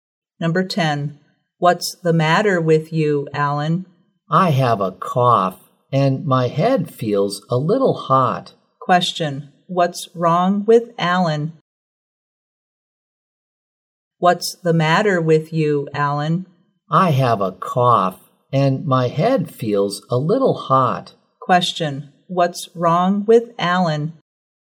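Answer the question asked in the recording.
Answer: He has a cough and a slight fever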